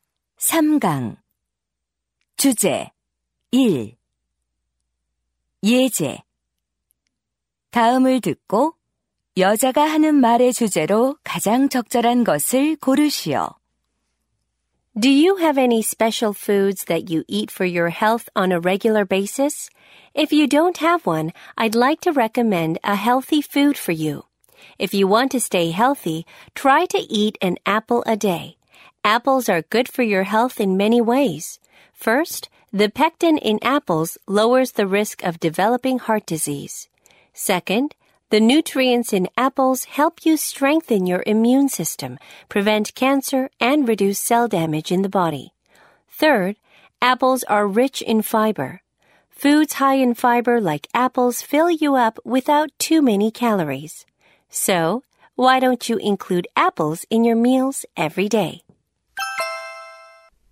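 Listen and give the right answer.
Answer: 매일 사과를 먹는 것의 건강상 이점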